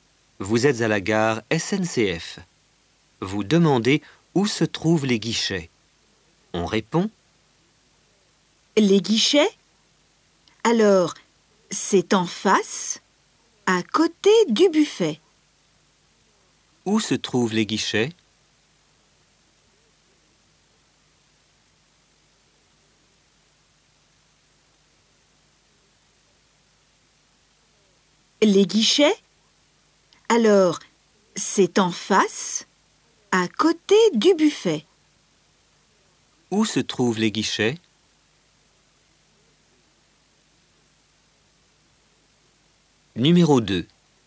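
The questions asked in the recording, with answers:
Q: Où se trouvent les guichets?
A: En face, à côté du buffet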